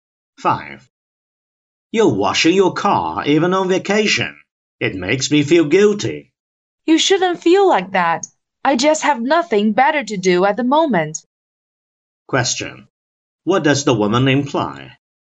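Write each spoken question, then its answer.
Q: What does the woman imply?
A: She is washing the car because she has nothing better to do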